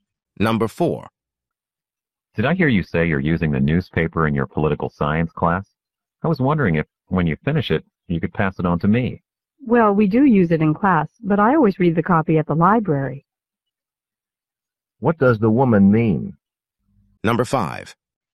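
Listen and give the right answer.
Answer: She doesn't have her own copy of the newspaper to give him.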